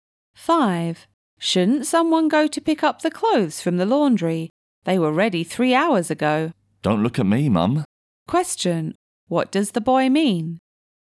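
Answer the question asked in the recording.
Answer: He doesn't want to go and pick up the clothes himself.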